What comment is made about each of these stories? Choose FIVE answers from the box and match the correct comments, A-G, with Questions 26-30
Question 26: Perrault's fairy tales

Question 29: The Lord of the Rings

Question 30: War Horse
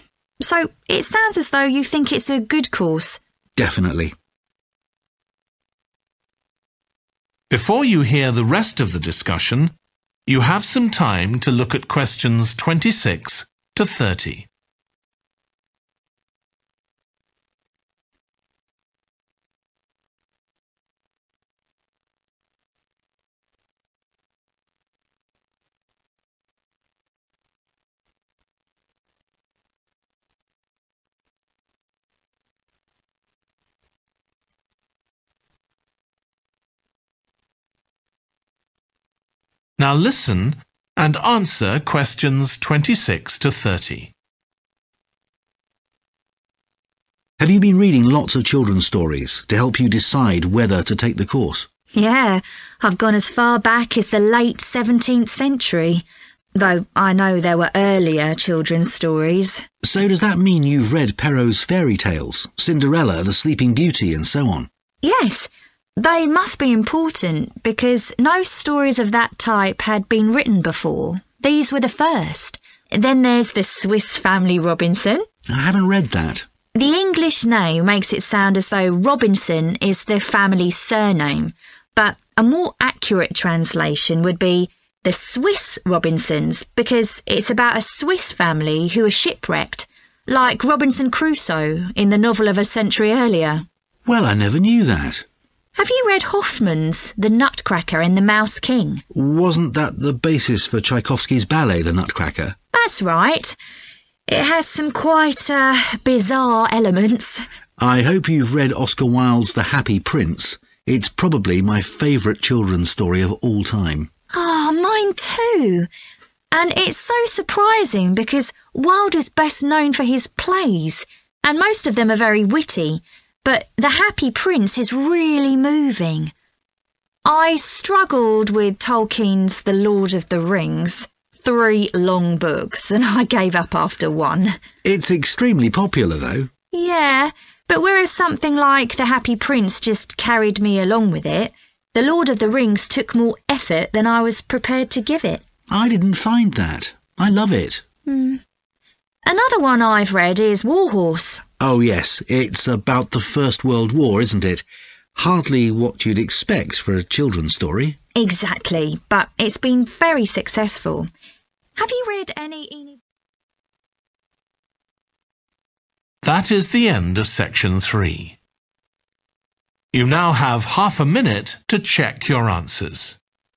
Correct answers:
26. F. started a new genre
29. B. hard to read
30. G. unlikely topic